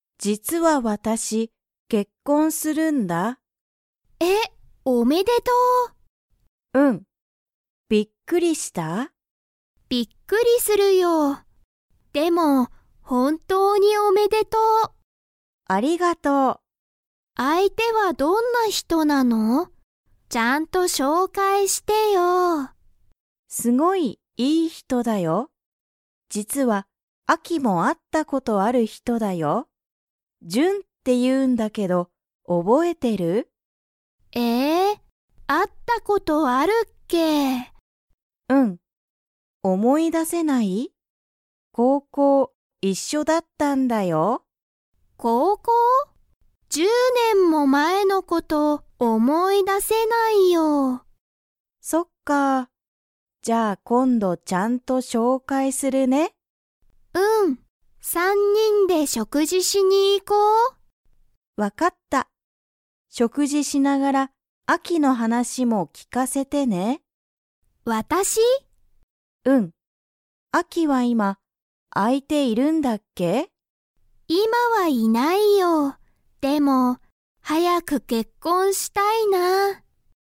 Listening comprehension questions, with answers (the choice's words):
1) アキは、ミユキに相手あいてをちゃんと してほしい。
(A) 結婚けっこん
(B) 紹介しょうかい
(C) 食事しょくじ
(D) おめでとう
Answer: 紹介しょうかい

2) アキは、はやく結婚けっこん 。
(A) したい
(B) したくない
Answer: したい

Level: Level 3